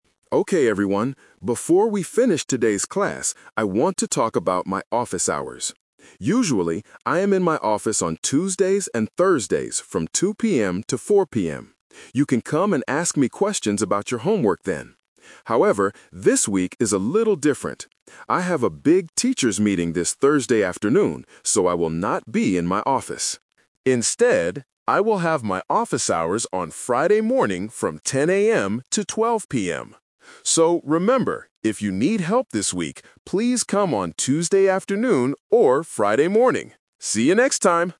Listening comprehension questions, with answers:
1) What days will the professor be in his office THIS week?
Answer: Tuesday and Friday

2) Why can't students meet the professor this Thursday?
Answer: He has a teachers' meeting.

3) What time can students see him on Friday?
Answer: 10:00 AM

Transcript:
Professor: Okay everyone, before we finish today's class, I want to talk about my office hours. Usually, I am in my office on Tuesdays and Thursdays from 2:00 PM to 4:00 PM. You can come and ask me questions about your homework then. However, this week is a little different. I have a big teachers' meeting this Thursday afternoon, so I will not be in my office. Instead, I will have my office hours on Friday morning from 10:00 AM to 12:00 PM. So, remember, if you need help this week, please come on Tuesday afternoon or Friday morning. See you next time!

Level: A2